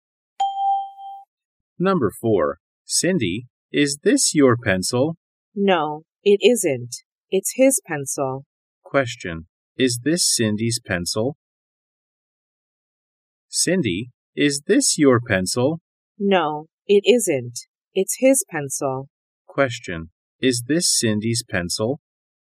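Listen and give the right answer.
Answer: No, it isn't.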